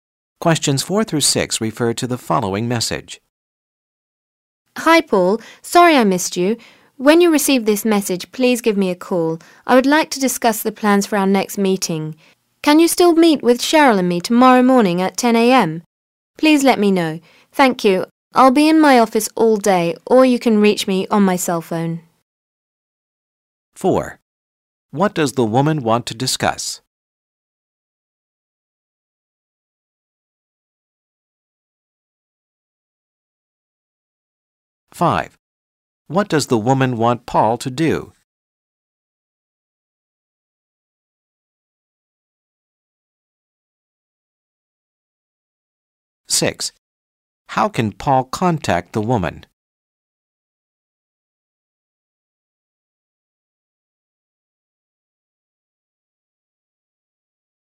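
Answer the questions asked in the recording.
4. Plans for their next meeting
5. Call her back
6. At her office or on her cell phone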